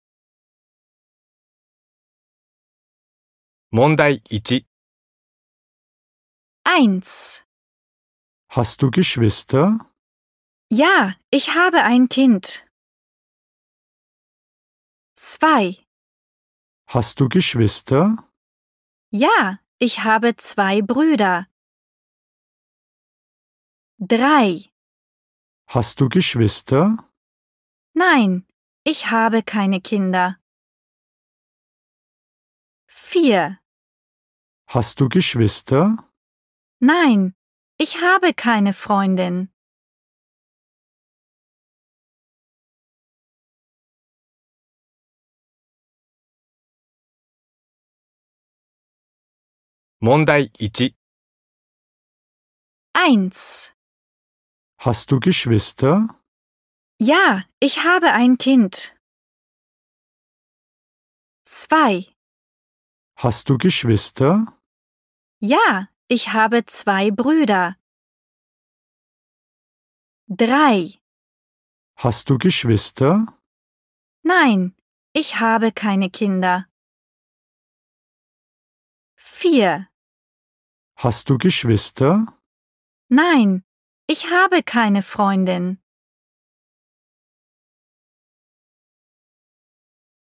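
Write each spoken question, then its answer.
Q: Hast du Geschwister?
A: 2: Ja, ich habe 2 Brüder.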